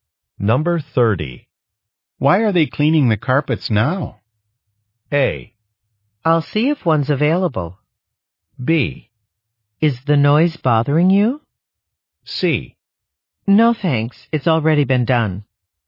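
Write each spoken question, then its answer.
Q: Why are they cleaning the carpets now?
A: B: Is the noise bothering you?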